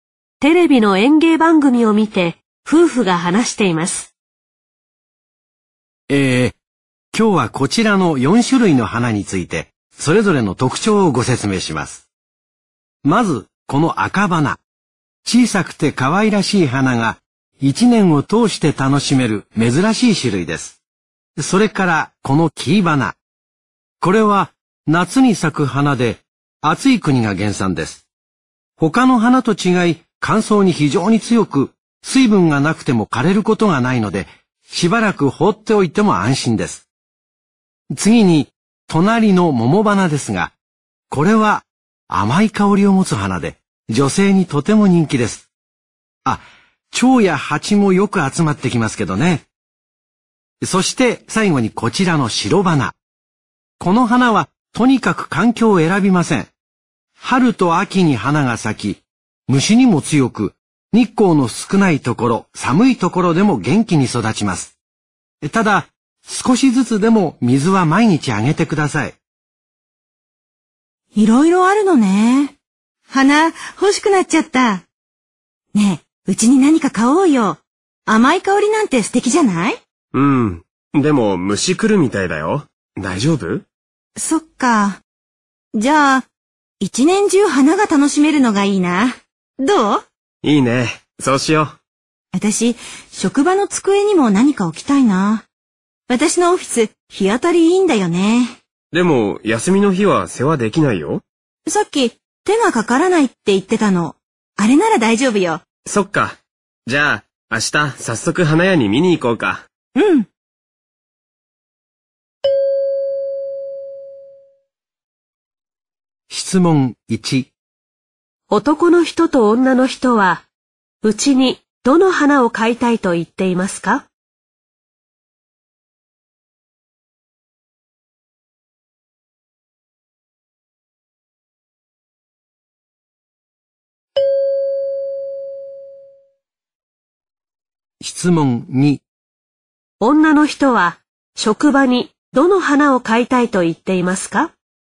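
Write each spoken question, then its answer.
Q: 男の人と女の人は、うちにどの花を買いたいと言っていますか?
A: 赤花

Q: 女の人は職場にどの花を買いたいと言っていますか?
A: キイバナ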